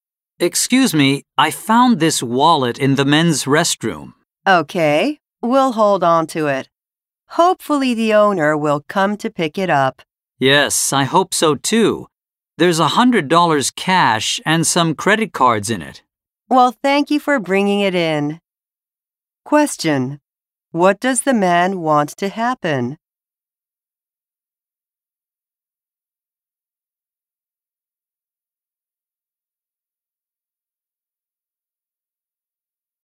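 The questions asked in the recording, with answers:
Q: What does the man want to happen?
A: He wants the wallet's owner to come and pick it up.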